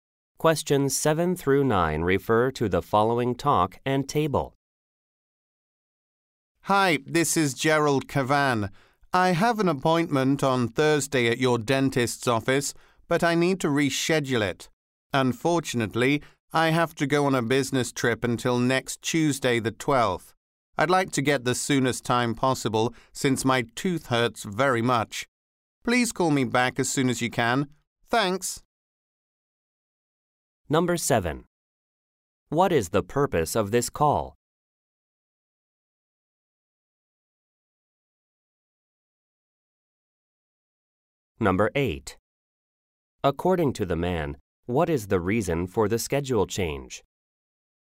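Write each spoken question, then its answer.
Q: What is the purpose of this call?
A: To reschedule a dentist appointment

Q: According to the man, what is the reason for the schedule change?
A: He has to go on a business trip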